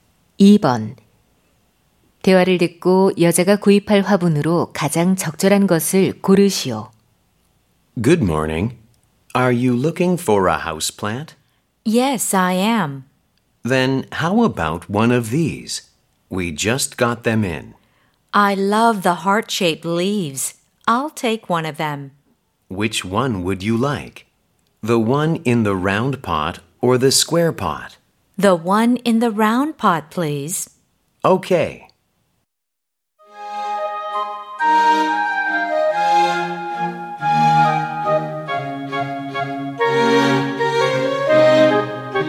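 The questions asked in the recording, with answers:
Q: 대화를 듣고 여자가 구입할 화분으로 가장 적절한 것을 고르시오.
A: 하트 모양 잎의 둥근 화분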